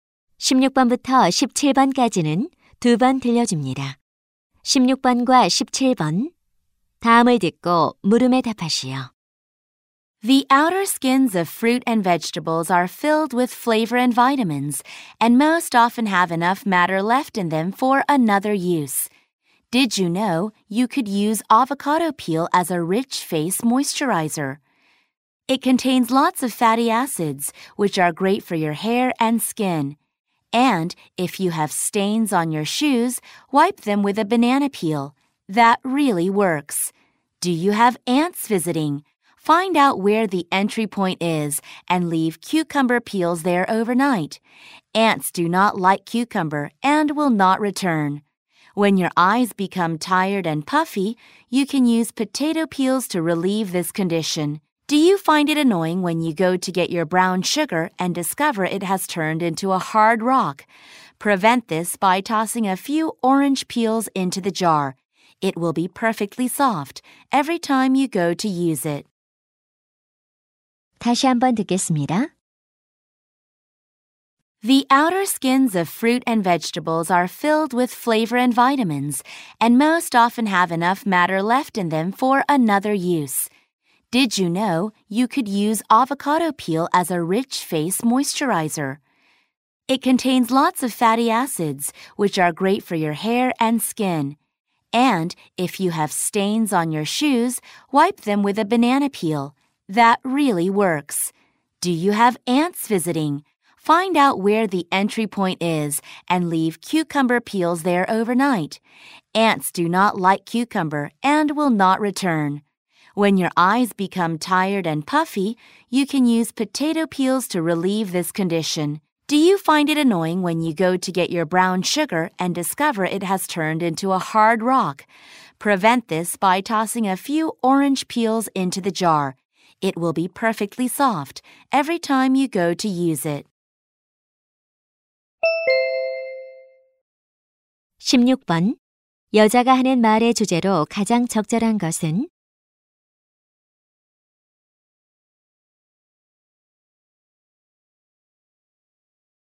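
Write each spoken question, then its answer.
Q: 여자가 하는 말의 주제로 가장 적절한 것은?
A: 과일과 채소 껍질의 다양한 활용법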